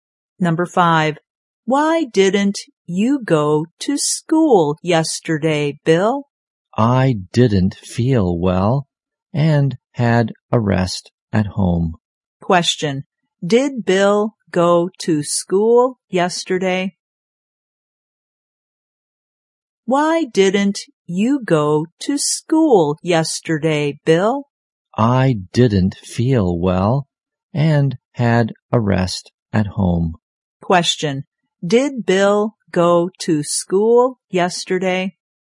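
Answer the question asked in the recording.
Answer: No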